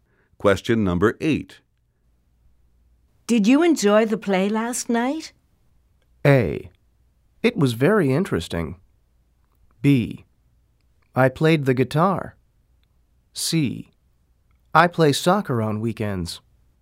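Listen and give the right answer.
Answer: A: It was very interesting.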